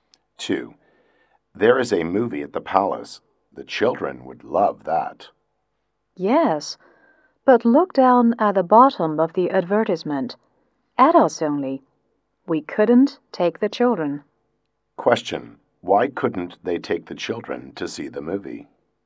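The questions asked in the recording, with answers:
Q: why couldn't they take the children to see the movie?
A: The movie is for adults only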